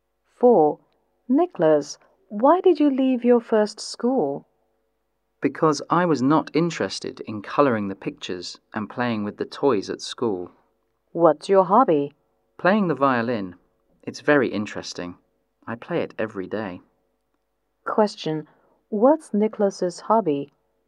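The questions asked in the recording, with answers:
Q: What's Nicholas's hobby?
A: Playing the violin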